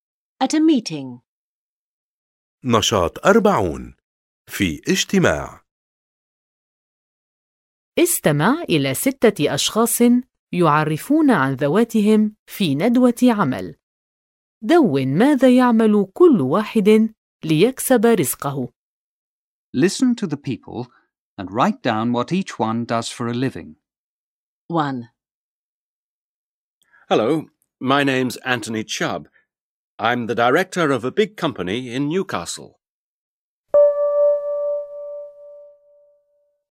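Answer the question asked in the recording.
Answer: He is the director of a big company in Newcastle.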